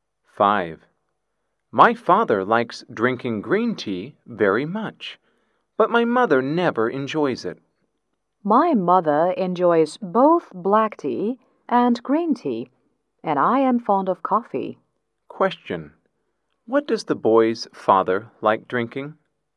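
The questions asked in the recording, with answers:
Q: What does the boy's father like drinking?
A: Green tea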